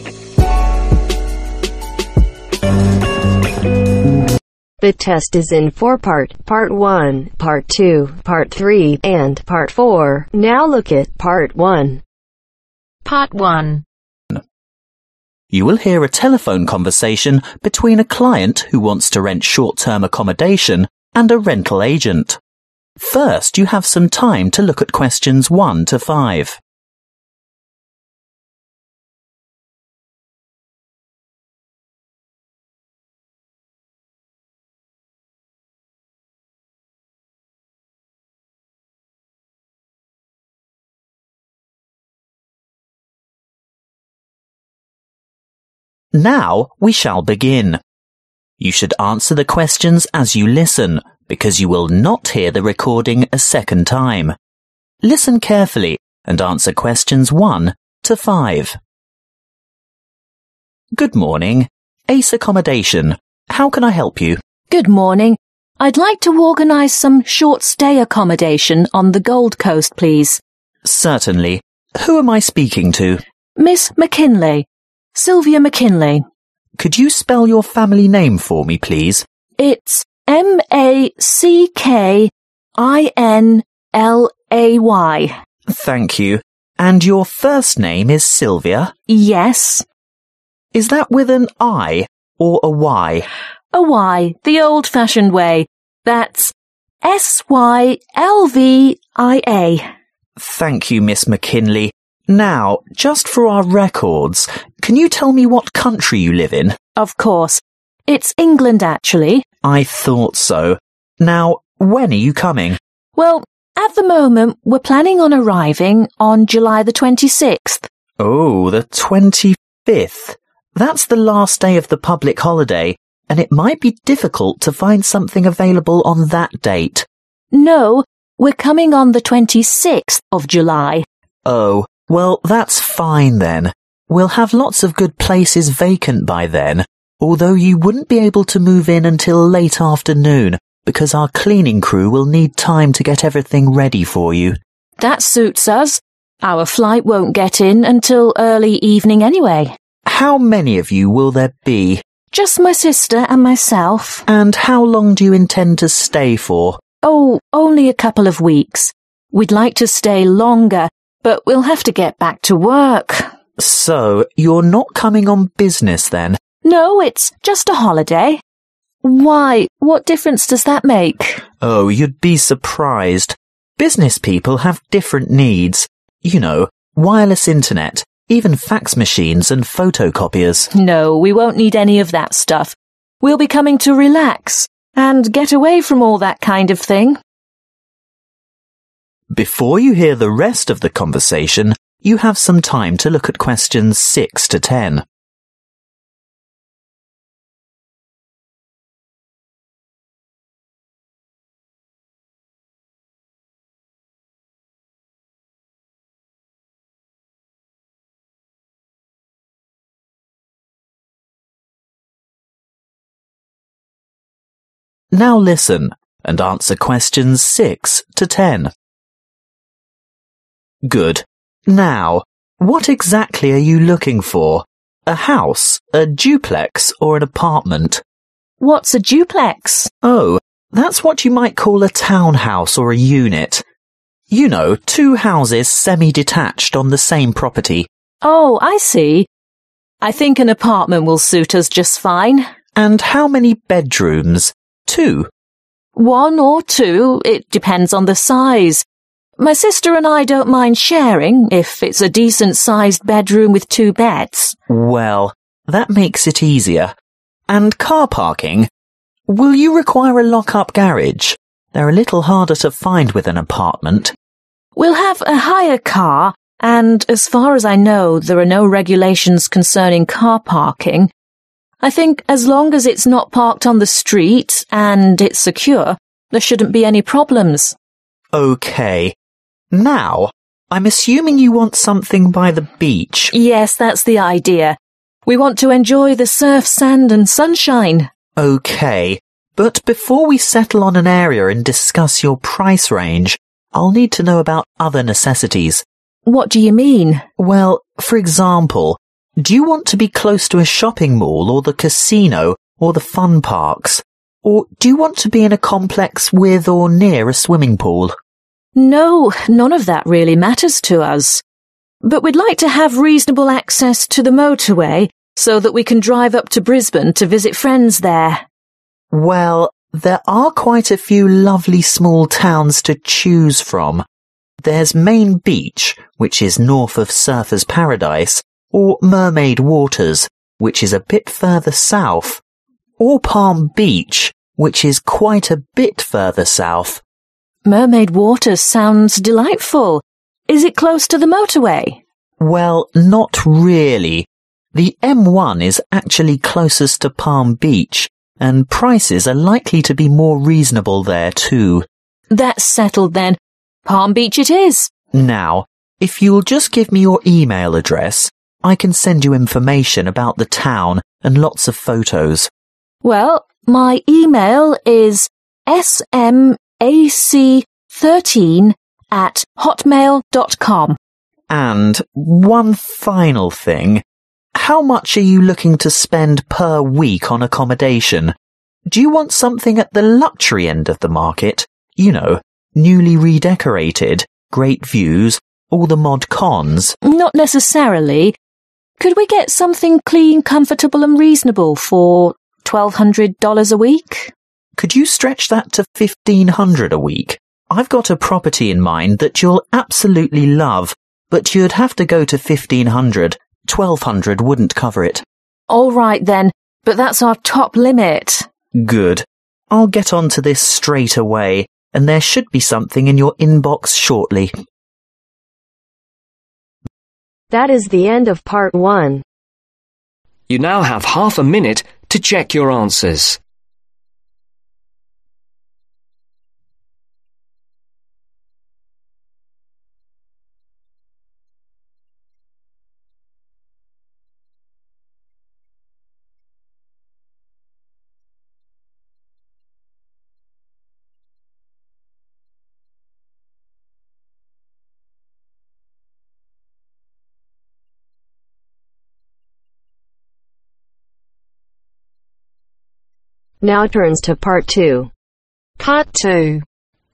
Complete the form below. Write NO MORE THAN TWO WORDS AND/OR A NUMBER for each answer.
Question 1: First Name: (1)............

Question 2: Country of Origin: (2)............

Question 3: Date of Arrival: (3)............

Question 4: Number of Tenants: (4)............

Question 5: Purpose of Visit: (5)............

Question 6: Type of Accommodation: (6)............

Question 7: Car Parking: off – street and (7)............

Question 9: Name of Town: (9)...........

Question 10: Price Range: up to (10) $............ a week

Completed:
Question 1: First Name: Sylvia
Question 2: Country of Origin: England
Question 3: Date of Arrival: July 26
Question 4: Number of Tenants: 2
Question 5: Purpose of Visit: (on) Holiday
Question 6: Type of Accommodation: Apartment
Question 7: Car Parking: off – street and Secure
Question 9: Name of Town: Palm Beach
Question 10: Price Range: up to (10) $1500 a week